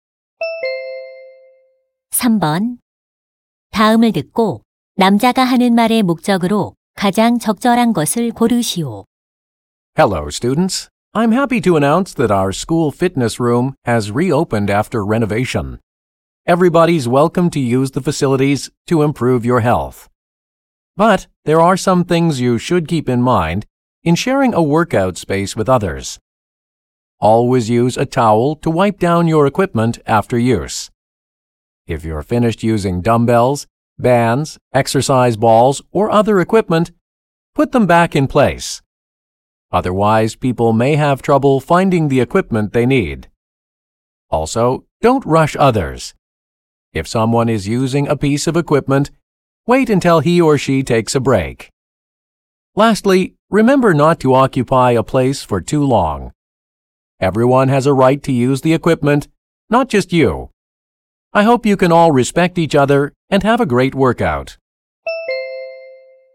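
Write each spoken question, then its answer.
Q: 다음을 듣고 남자가 하는 말의 목적으로 가장 적절한 것을 고르시오.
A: 재개장한 체력단련실 이용 수칙을 안내하려고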